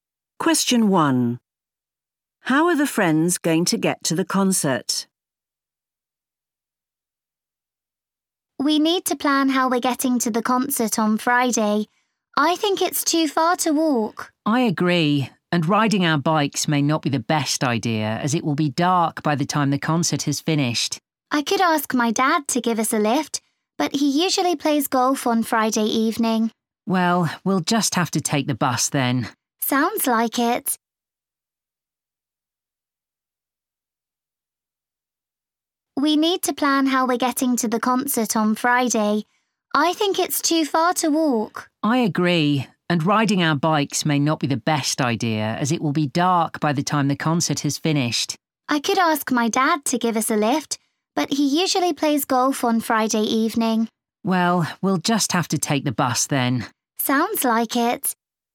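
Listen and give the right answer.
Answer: By bus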